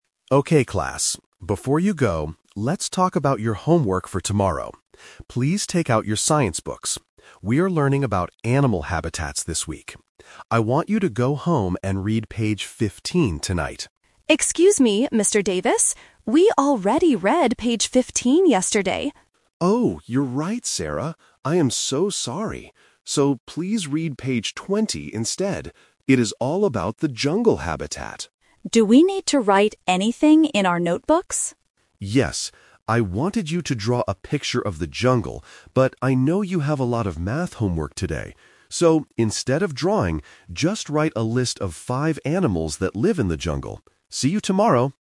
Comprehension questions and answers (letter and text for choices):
Listen to a teacher giving homework to his students and choose the correct answer (A, B, or C).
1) What page do the students need to read?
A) Page 15.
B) Page 20.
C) Page 25.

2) What habitat is the homework about?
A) The ocean.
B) The desert.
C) The jungle.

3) What do the students have to do in their notebooks?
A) Draw a picture of the jungle.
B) Write a list of five jungle animals.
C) Do their math homework.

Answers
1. B) Page 20.
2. C) The jungle.
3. B) Write a list of five jungle animals.

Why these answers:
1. The teacher corrects his mistake and says, "please read page 20 instead." Option (A) is the trap; the teacher initially says page 15, but the student reminds him they already read it (The Twist). Option (C) is not mentioned.
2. The teacher clearly says, "It is all about the jungle habitat." Options (A) and (B) are other types of habitats but are not mentioned in this audio.
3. The teacher gives the final instruction: "just write a list of five animals that live in the jungle." Option (A) is the trap; the teacher thought about asking them to draw a picture but changed his mind because they are busy. Option (C) is a distractor; math homework is mentioned as a reason they are busy, but it is not the science homework.

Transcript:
Teacher: Okay class, before you go, let's talk about your homework for tomorrow. Please take out your science books. We are learning about animal habitats this week. I want you to go home and read page 15 tonight.
Student: Excuse me, Mr. Davis? We already read page 15 yesterday.
Teacher: Oh, you're right, Sarah! I am so sorry. So, please read page 20 instead. It is all about the jungle habitat.
Student: Do we need to write anything in our notebooks?
Teacher: Yes. I wanted you to draw a picture of the jungle, but I know you have a lot of math homework today. So, instead of drawing, just write a list of five animals that live in the jungle. See you tomorrow!